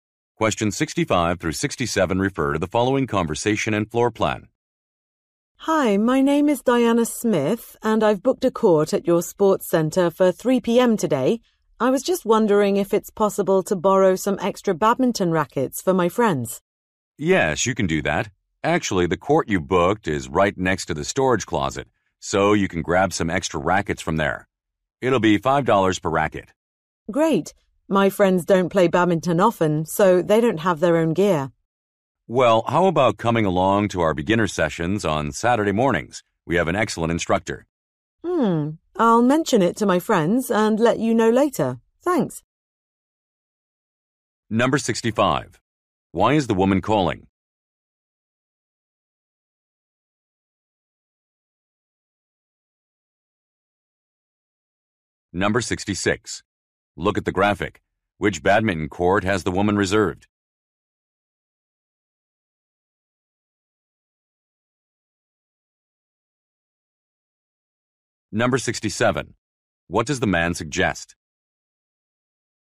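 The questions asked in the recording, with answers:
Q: Why is the woman calling?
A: To borrow extra badminton rackets

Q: What does the man suggest?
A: Attending beginner sessions on Saturday mornings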